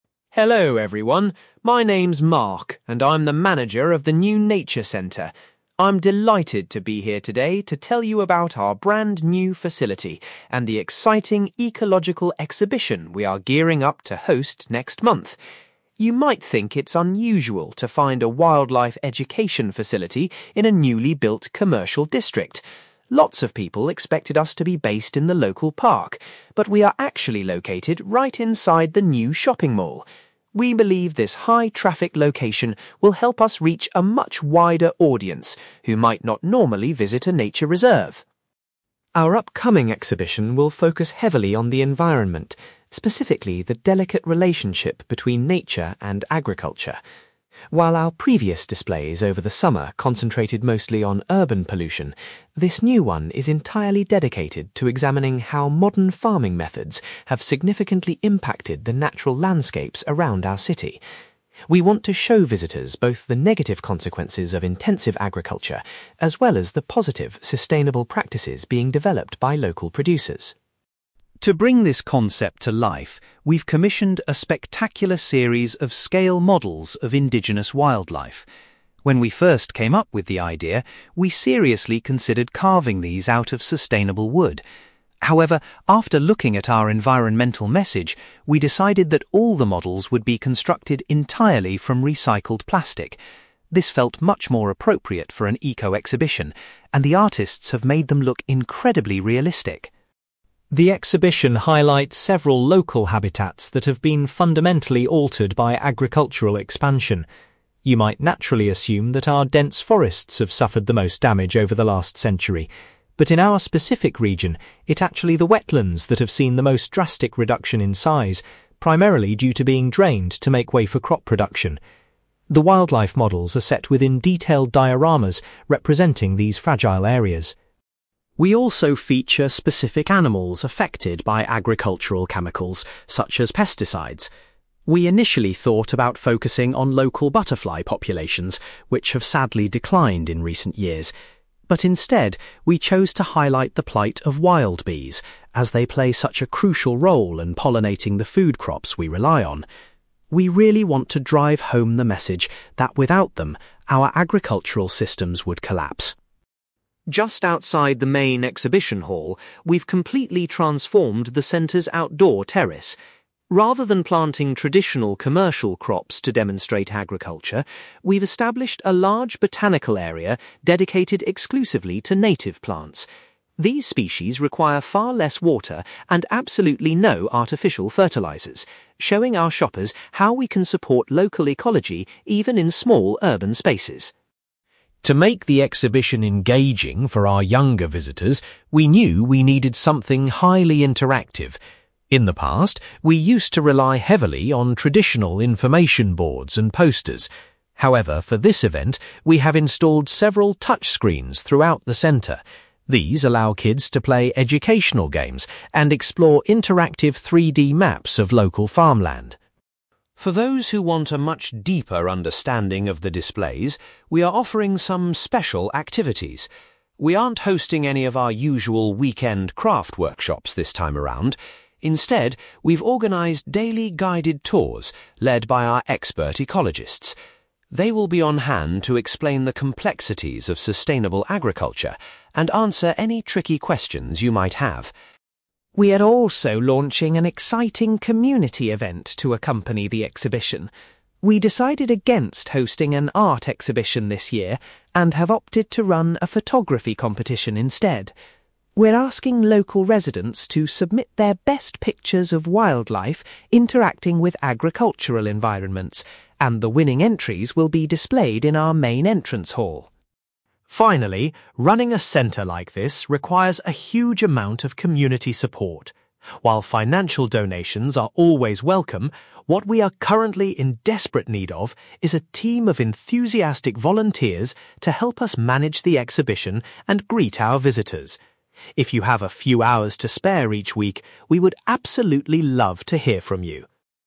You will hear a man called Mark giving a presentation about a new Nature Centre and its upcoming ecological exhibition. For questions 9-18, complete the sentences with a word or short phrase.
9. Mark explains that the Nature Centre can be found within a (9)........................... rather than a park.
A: shopping mall

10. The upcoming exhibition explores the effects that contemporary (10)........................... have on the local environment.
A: farming methods

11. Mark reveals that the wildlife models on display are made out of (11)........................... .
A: recycled plastic

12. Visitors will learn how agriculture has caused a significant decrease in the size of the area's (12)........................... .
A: wetlands

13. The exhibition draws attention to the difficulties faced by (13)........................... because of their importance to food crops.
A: wild bees

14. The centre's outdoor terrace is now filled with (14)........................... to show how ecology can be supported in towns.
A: native plants

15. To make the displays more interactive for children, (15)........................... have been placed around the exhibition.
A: touch screens

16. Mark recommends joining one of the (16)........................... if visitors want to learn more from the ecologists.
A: guided tours

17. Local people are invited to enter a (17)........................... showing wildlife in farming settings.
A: photography competition

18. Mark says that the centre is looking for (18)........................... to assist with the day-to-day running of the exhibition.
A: volunteers

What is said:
Mark: Hello everyone. My name is Mark, and I'm the manager of the new Nature Centre. I'm delighted to be here today to tell you about our brand-new facility and the exciting ecological exhibition we are gearing up to host next month. You might think it's unusual to find a wildlife education facility in a newly built commercial district. Lots of people expected us to be based in the local park, but we are actually located right inside the new shopping mall. We believe this high-traffic location will help us reach a much wider audience who might not normally visit a nature reserve.
Our upcoming exhibition will focus heavily on the environment, specifically the delicate relationship between nature and agriculture. While our previous displays over the summer concentrated mostly on urban pollution, this new one is entirely dedicated to examining how modern farming methods have significantly impacted the natural landscapes around our city. We want to show visitors both the negative consequences of intensive agriculture, as well as the positive, sustainable practices being developed by local producers.
To bring this concept to life, we've commissioned a spectacular series of scale models of indigenous wildlife. When we first came up with the idea, we seriously considered carving these out of sustainable wood. However, after looking at our environmental message, we decided that all the models would be constructed entirely from recycled plastic. This felt much more appropriate for an eco-exhibition, and the artists have made them look incredibly realistic!
The exhibition highlights several local habitats that have been fundamentally altered by agricultural expansion. You might naturally assume that our dense forests have suffered the most damage over the last century. But in our specific region, it's actually the wetlands that have seen the most drastic reduction in size, primarily due to being drained to make way for crop production. The wildlife models are set within detailed dioramas representing these fragile areas.
We also feature specific animals affected by agricultural chemicals, such as pesticides. We initially thought about focusing on local butterfly populations, which have sadly declined in recent years. But instead, we chose to highlight the plight of wild bees, as they play such a crucial role in pollinating the food crops we rely on. We really want to drive home the message that without them, our agricultural systems would collapse.
Just outside the main exhibition hall, we've completely transformed the centre's outdoor terrace. Rather than planting traditional commercial crops to demonstrate agriculture, we've established a large botanical area dedicated exclusively to native plants. These species require far less water and absolutely no artificial fertilizers, showing our shoppers how we can support local ecology even in small, urban spaces.
To make the exhibition engaging for our younger visitors, we knew we needed something highly interactive. In the past, we used to rely heavily on traditional information boards and posters. However, for this event, we have installed several touch screens throughout the centre. These allow kids to play educational games and explore interactive 3D maps of local farmland.
For those who want a much deeper understanding of the displays, we are offering some special activities. We aren't hosting any of our usual weekend craft workshops this time around; instead, we've organised daily guided tours led by our expert ecologists. They will be on hand to explain the complexities of sustainable agriculture and answer any tricky questions you might have.
We are also launching an exciting community event to accompany the exhibition. We decided against hosting an art exhibition this year, and have opted to run a photography competition instead. We're asking local residents to submit their best pictures of wildlife interacting with agricultural environments, and the winning entries will be displayed in our main entrance hall.
Finally, running a centre like this requires a huge amount of community support. While financial donations are always welcome, what we are currently in desperate need of is a team of enthusiastic volunteers to help us manage the exhibition and greet our visitors. If you have a few hours to spare each week, we would absolutely love to hear from you.

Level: B2